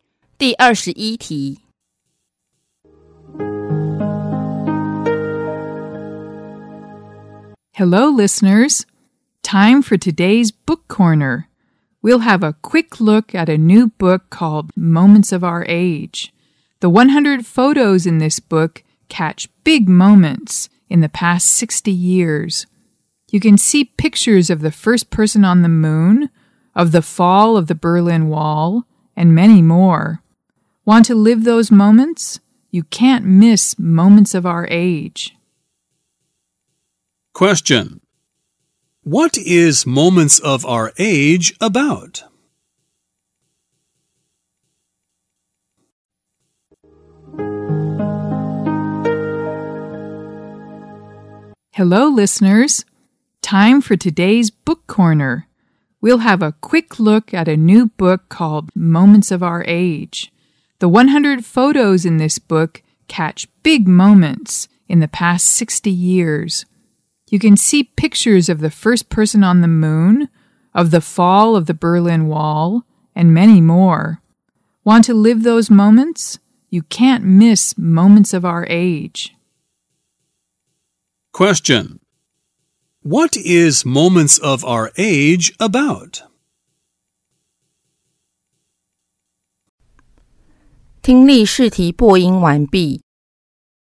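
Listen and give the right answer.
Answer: Photos of big moments from the past 60 years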